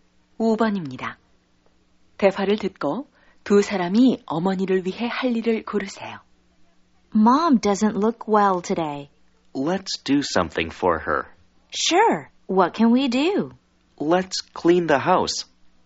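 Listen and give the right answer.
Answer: 집 청소하기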